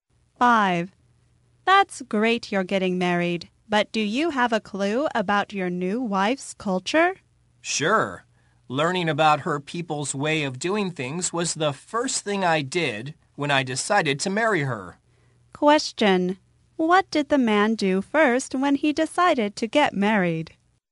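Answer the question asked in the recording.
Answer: He learned about his wife's culture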